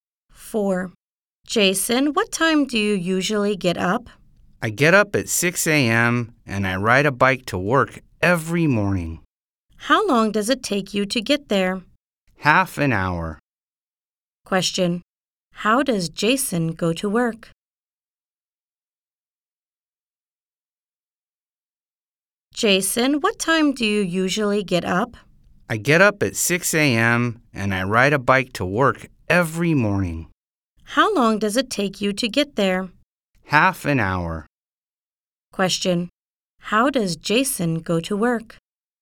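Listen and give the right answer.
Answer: He rides a bike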